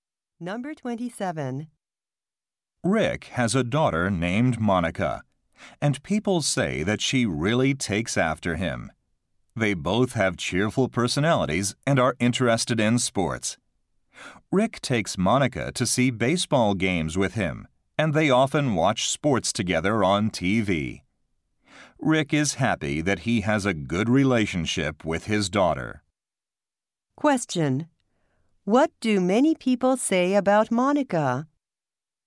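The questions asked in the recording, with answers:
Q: What do many people say about Monica?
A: She takes after her father.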